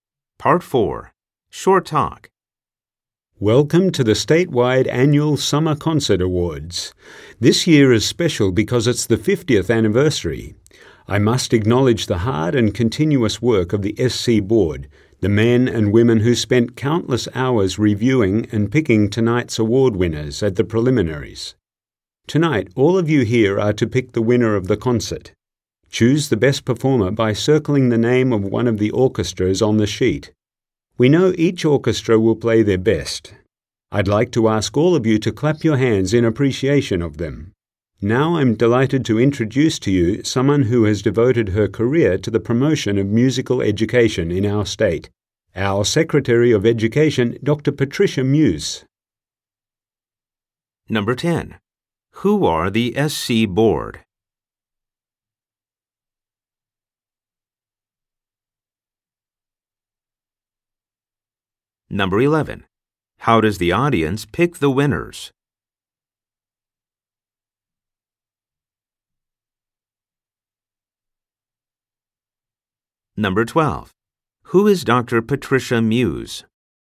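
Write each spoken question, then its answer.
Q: Who are the SC Board?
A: The people who reviewed and picked the award winners at the preliminaries

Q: How does the audience pick the winners?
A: By circling an orchestra's name on the sheet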